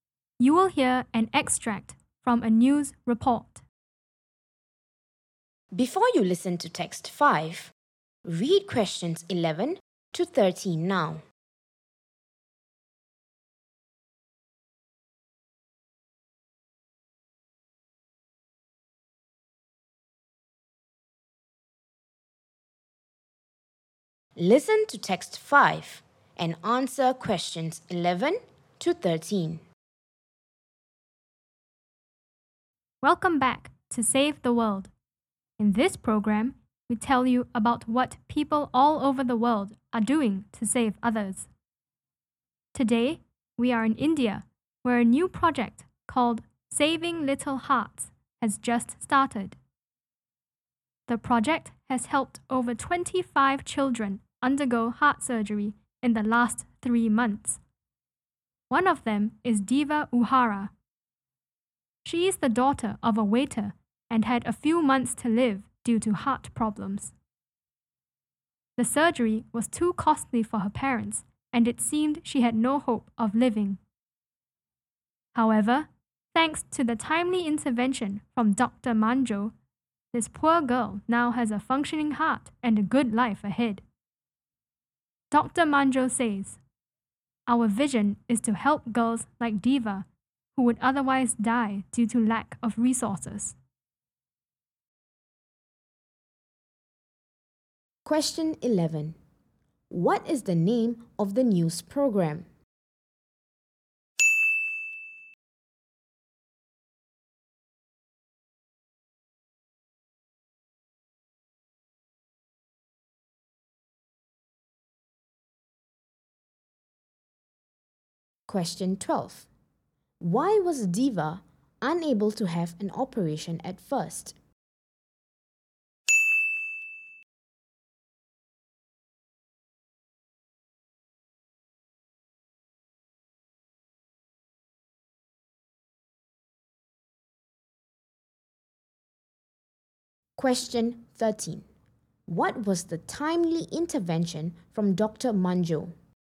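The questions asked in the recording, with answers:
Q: What is the name of the news program?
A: Save the World

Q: Why was Diva unable to have an operation at first?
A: The surgery was too costly for her parents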